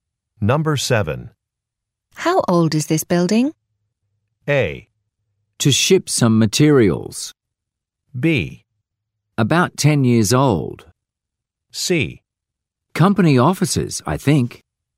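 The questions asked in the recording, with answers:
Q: How old is this building?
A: B: About 10 years old.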